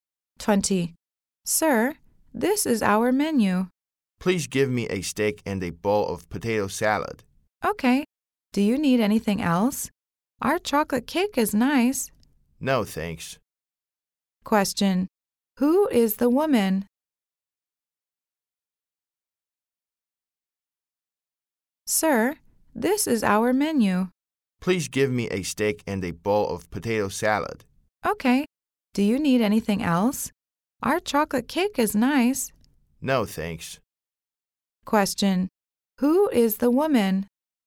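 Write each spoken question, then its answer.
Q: Question. Who is the woman?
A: A waitress.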